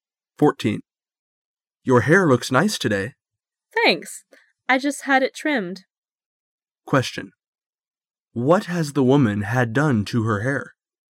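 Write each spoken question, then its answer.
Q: What has the woman had done to her hair?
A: She had it trimmed.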